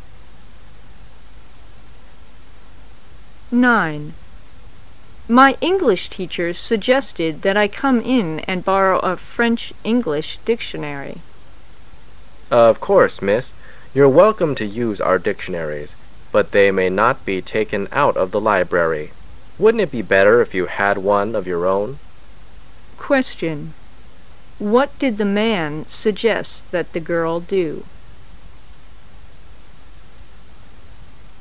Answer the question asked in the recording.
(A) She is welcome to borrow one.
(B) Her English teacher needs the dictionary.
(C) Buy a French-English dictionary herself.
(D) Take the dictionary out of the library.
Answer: (C) Buy a French-English dictionary herself.

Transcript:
[解析] W: My English teacher suggested that I come in and borrow a French-English Dictionary. M: Of course, Miss. You're welcome to use our dictionaries, but they may not be taken out of library. Wouldn't it be better if you had one of your own? Q: What did the man suggest that the girl do?